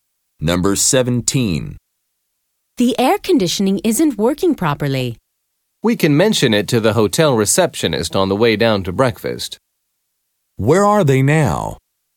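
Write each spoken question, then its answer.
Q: Where are they now?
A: In their hotel room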